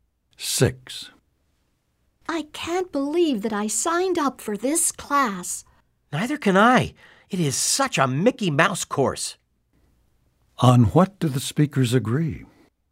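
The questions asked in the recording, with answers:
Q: On what do the speakers agree?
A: The course is too easy and unimportant.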